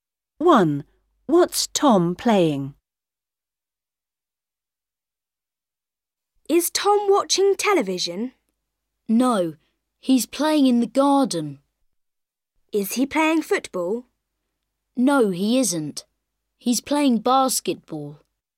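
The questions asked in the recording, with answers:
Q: What's Tom playing?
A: basketball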